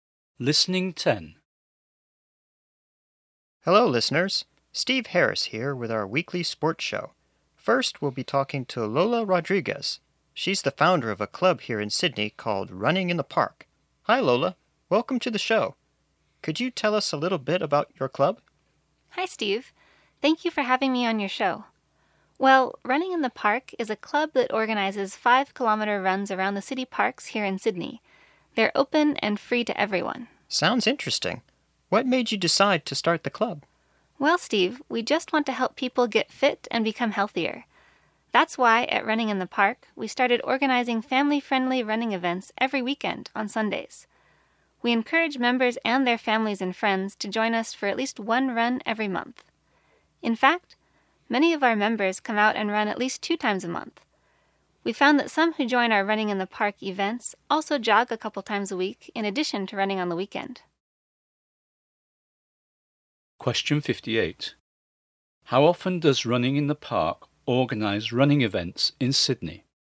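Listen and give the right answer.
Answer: Every weekend, on Sundays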